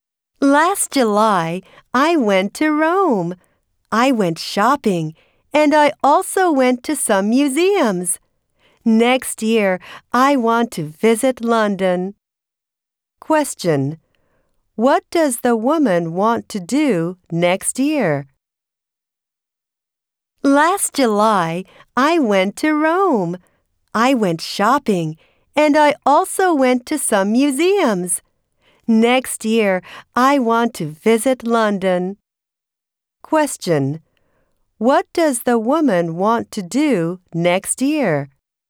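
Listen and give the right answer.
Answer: Visit London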